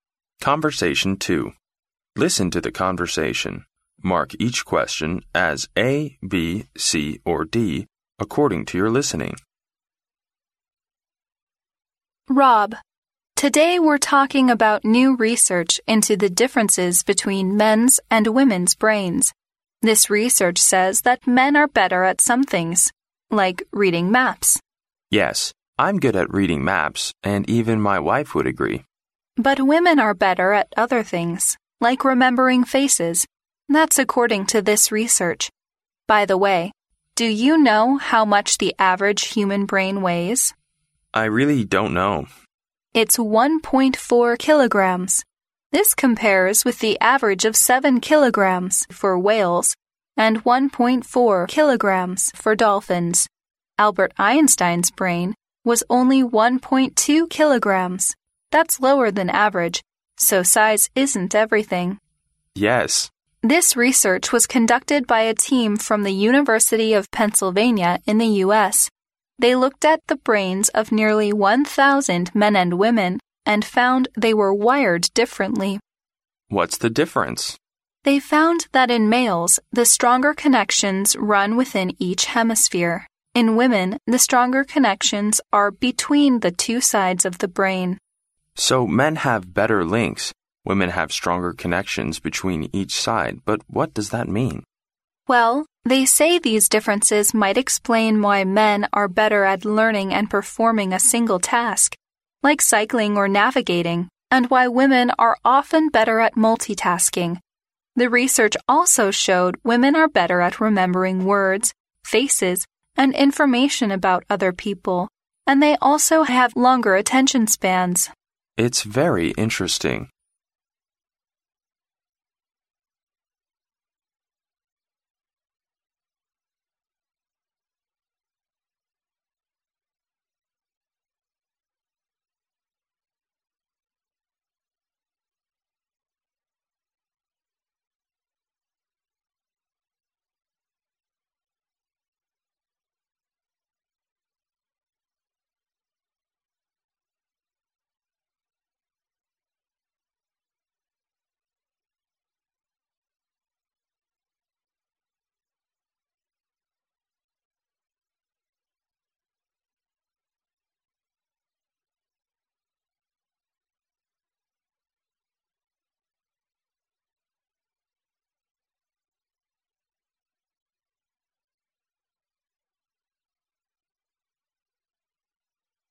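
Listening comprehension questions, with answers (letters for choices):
Listen to the conversation, mark each question as A, B, C or D according to your listening.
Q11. What research are the speakers talking about?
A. How the human brain works.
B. Why men are good at reading maps.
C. The difference between men's and women's brains.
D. The difference between human brain and animal brain.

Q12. How much does whales' brain weigh on average?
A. 1.2 kilograms.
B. 1.4 kilograms.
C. 1.7 kilograms.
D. 7 kilograms.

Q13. How did the researchers conduct the research?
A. By performing 1,000 operations on brains.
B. By observing the brains of nearly 1,000 people.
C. By drawing the pictures of human brains.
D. By comparing animal brains with human brains.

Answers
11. C
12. D
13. B

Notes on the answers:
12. 录音中女士提到"This compares with the average of 7 kilograms for whales..."由此可知鲸鱼大脑的平均重量是7千克。故选D。

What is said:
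W: Rob, today we're talking about new research into the differences between men's and women's brains. This research says that men are better at some things, like reading maps.
M: Yes, I'm good at reading maps and even my wife would agree.
W: But women are better at other things, like remembering faces. That's according to this research. By the way, do you know how much the average human brain weighs?
M: I really don't know.
W: It's 1.4 kilograms. This compares with the average of 7 kilograms for whales and 1.4 kilograms for dolphins. Albert Einstein's brain was only 1.2 kilograms; that's lower than average, so size isn't everything.
M: Yes.
W: This research was conducted by a team from the University of Pennsylvania in the US. They looked at the brains of nearly 1,000 men and women and found they were wired differently.
M: What's the difference?
W: They found that in males, the stronger connections run within each hemisphere. 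In women the stronger connections are between the two sides of the brain.
M: So men have better links. Women have stronger connections between each side. But what does that mean?
W: Well, they say these differences might explain why men are better at learning and performing a single task, like cycling or navigating, and why women are often better at multi-tasking. The research also showed women are better at remembering words, faces and information about other people, and they also have longer attention spans.
M: It's very interesting.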